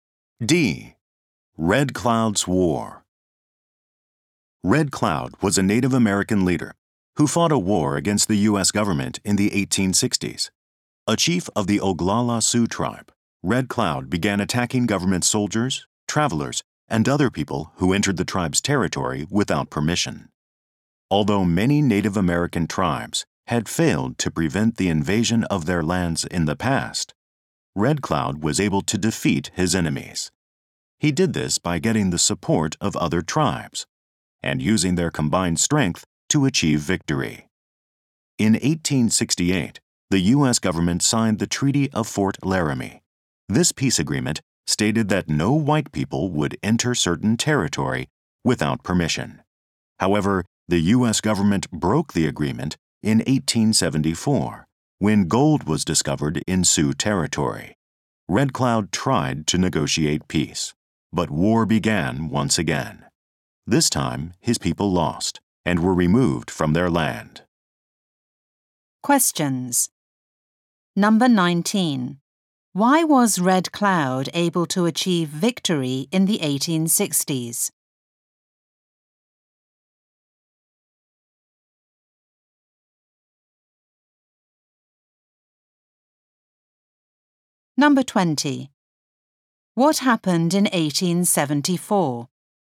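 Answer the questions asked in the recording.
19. He got other tribes to support him and combined their strength.
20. Gold was found in Sioux territory and the U.S. government broke the treaty.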